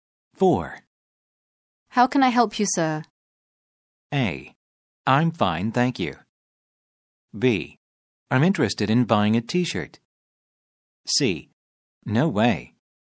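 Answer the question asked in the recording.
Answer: B: I'm interested in buying a t-shirt.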